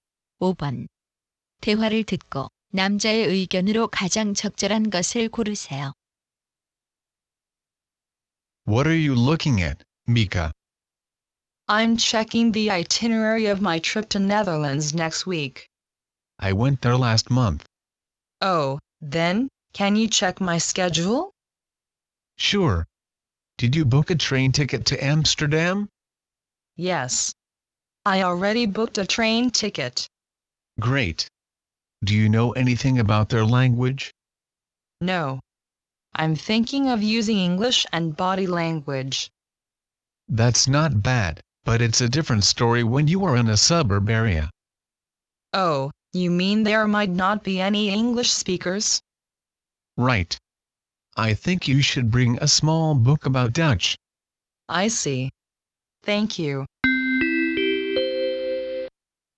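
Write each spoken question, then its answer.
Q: 대화를 듣고 남자의 의견으로 가장 적절한 것을 고르세요.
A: 네덜란드 여행 시 네덜란드어 관련 작은 책을 가져가야 한다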